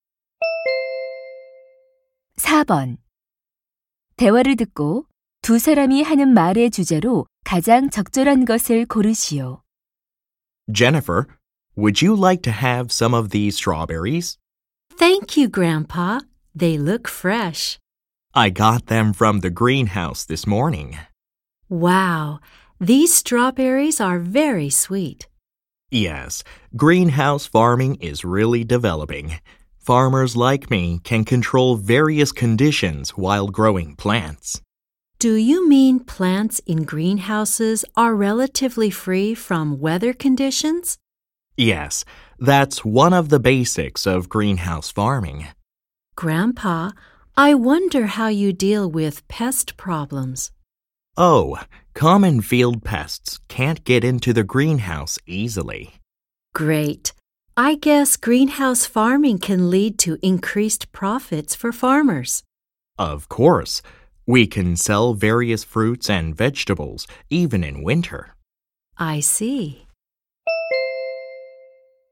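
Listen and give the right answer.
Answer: 온실 재배의 장점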